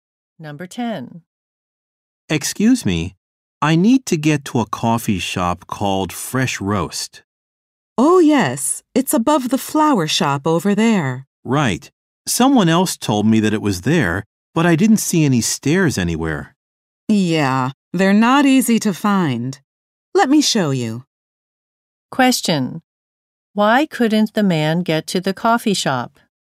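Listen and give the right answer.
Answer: He couldn't find the stairs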